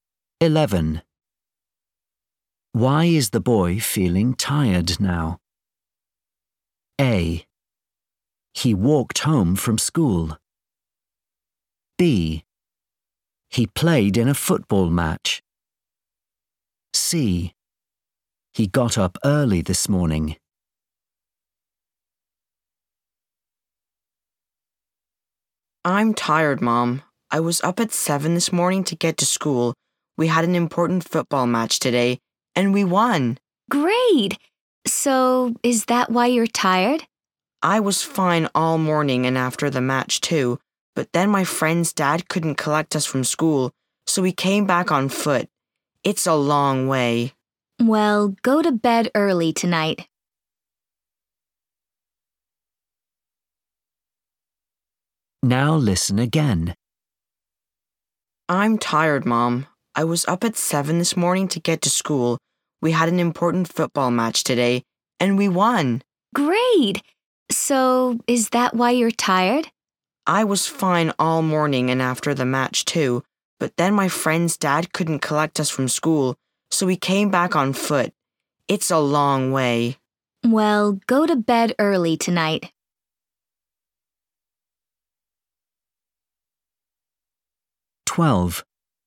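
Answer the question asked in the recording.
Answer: A: He walked home from school.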